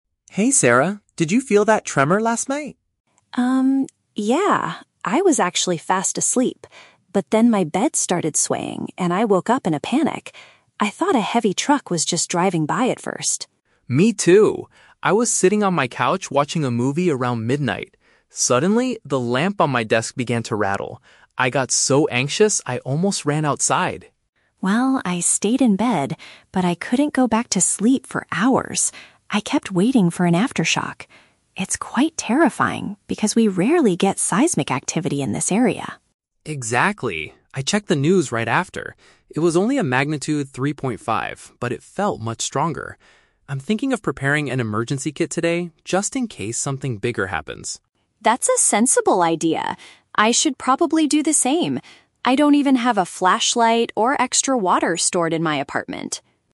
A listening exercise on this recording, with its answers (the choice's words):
Listen to a conversation between two friends and choose the correct answer (A, B, or C) for each question.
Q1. What did Sarah initially think caused the shaking?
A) A minor earthquake.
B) A large vehicle passing by.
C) A falling desk lamp.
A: A large vehicle passing by.

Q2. How did Mark react during the incident?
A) He ran out of his house immediately.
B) He felt extremely nervous.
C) He stayed in his bedroom waiting for an aftershock.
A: He felt extremely nervous.

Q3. What are they planning to do next?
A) Read more news about the earthquake.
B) Get some disaster survival supplies ready.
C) Buy a new television for the living room.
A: Get some disaster survival supplies ready.

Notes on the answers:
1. In the audio, Sarah says "I thought a heavy truck was just driving by at first". "Large vehicle" is a synonym for "heavy truck".
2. Mark says "I got so anxious". "Extremely nervous" is a paraphrase of "so anxious".
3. Mark says he is "thinking of preparing an emergency kit" and Sarah agrees to do the same. "Disaster survival supplies" is a paraphrase of "emergency kit".

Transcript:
Mark: Hey Sarah, did you feel that tremor last night?
I was actually fast asleep. But then my bed started swaying, and I woke up in a panic. I thought a heavy truck was just driving by at first.
Mark: Me too! I was sitting on my couch watching a movie around midnight. Suddenly, the lamp on my desk began to rattle. I got so anxious, I almost ran outside.
Sarah: Well, I stayed in bed, but I couldn't go back to sleep for hours. I kept waiting for an aftershock. It's quite terrifying because we rarely get seismic activity in this area.
Mark: Exactly. I checked the news right after. It was only a magnitude 3.5, but it felt much stronger. I'm thinking of preparing an emergency kit today, just in case something bigger happens.
Sarah: That's a sensible idea. I should probably do the same. I don't even have a flashlight or extra water stored in my apartment.